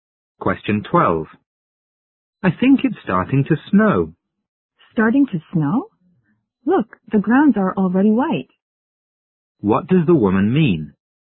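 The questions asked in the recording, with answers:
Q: What does the woman mean?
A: It has already been snowing for some time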